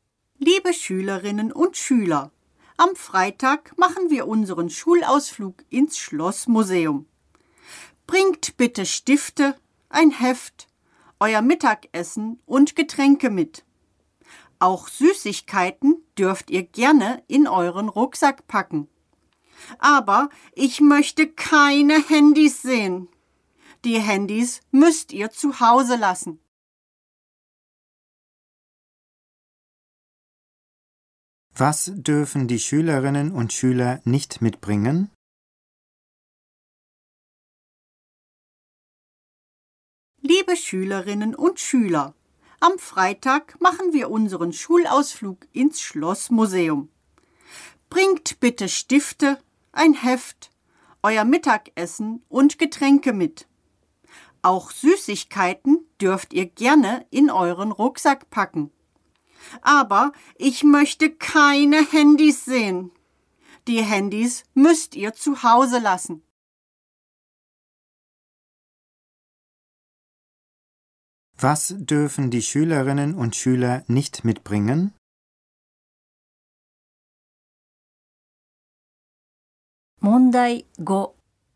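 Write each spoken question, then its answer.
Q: Was dürfen die Schülerinnen und Schüler nicht mitbringen?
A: Handys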